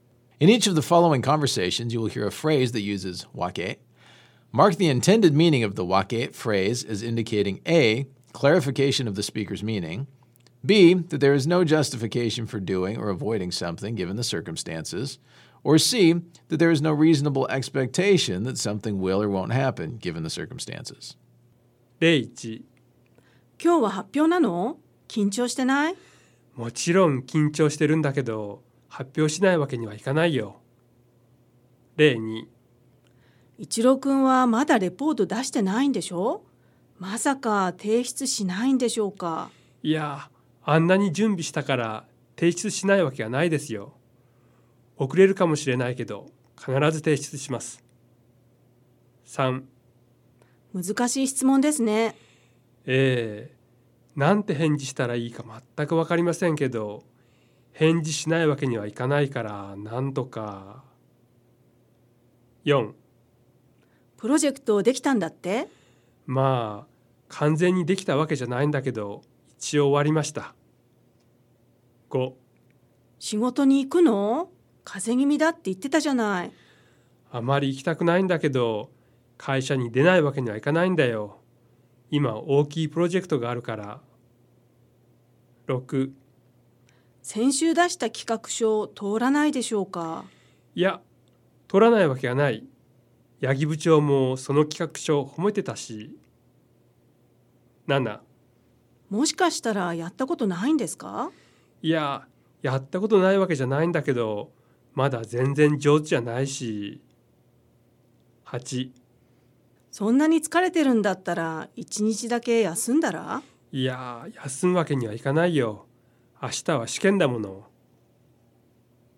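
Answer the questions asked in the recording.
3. B: that there is no justification for doing or avoiding something given the circumstances
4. A: clarification of the speaker's meaning
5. B: that there is no justification for doing or avoiding something given the circumstances
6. C: that there is no reasonable expectation that something will or won't happen given the circumstances
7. A: clarification of the speaker's meaning
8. B: that there is no justification for doing or avoiding something given the circumstances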